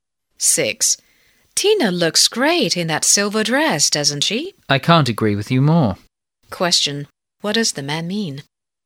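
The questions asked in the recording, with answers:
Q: Question: What does the man mean?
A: He agrees Tina looks great in the dress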